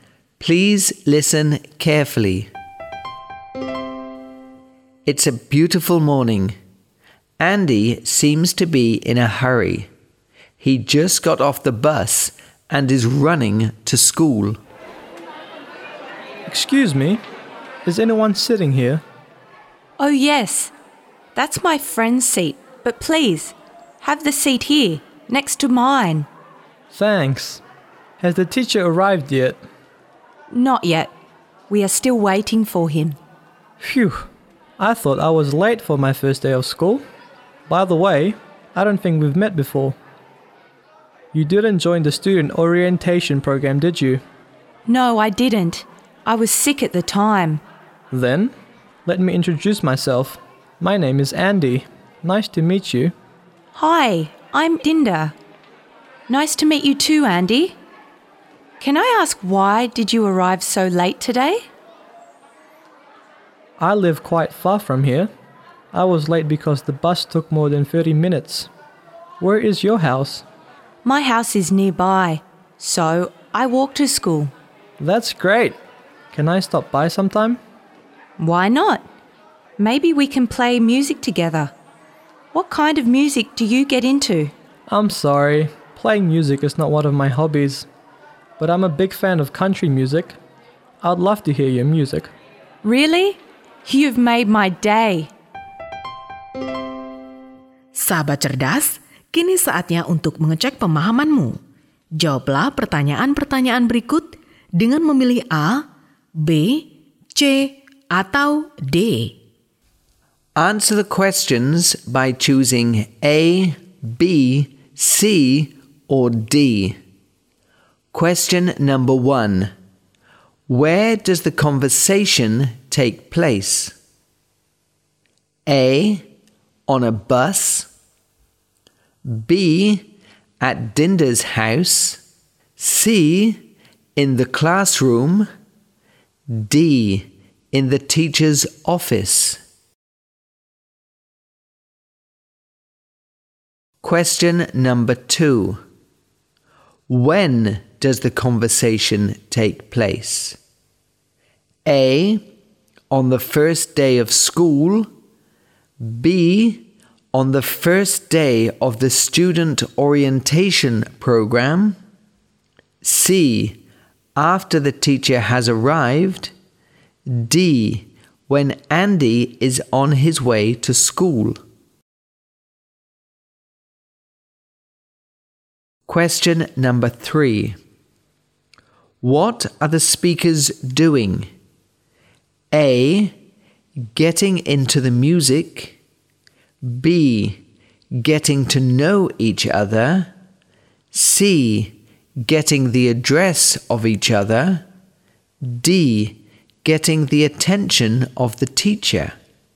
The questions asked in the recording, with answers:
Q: Where does the conversation take place?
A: C. In the classroom.

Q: When does the conversation take place?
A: A. On the first day of school.

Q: What are the speakers doing?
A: B. Getting to know each other.